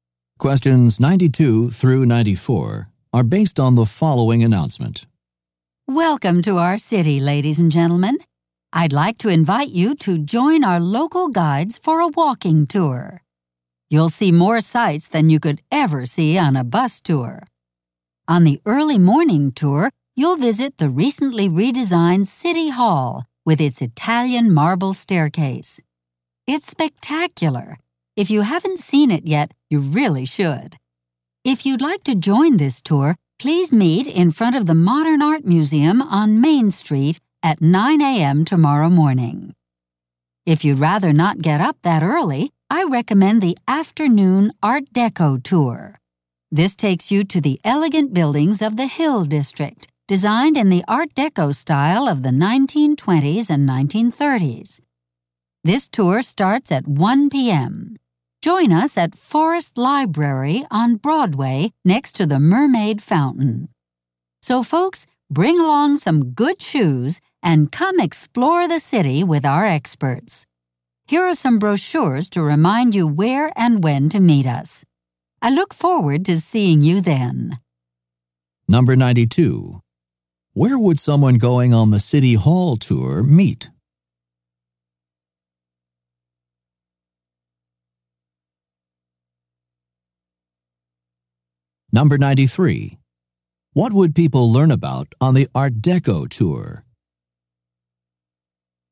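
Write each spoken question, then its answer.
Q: Where would someone going on the City Hall tour meet?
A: In front of the Modern Art Museum on Main Street

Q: What would people learn about on the Art Deco tour?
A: Art Deco buildings of the Hill District from the 1920s and 1930s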